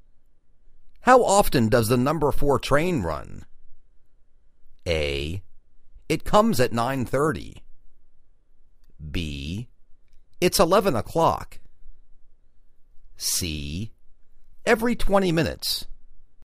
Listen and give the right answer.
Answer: Every 20 minutes